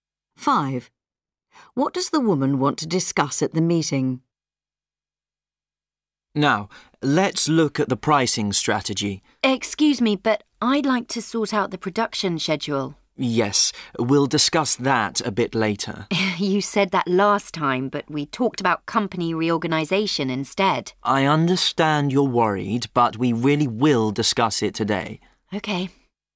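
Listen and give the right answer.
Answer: The production schedule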